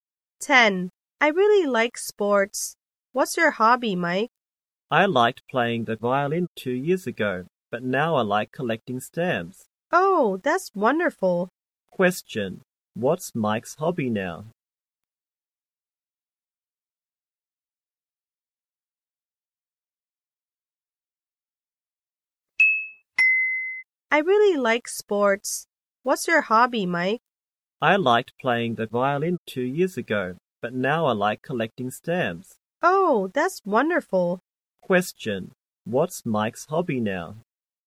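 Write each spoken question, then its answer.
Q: What's Mike's hobby now?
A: Collecting stamps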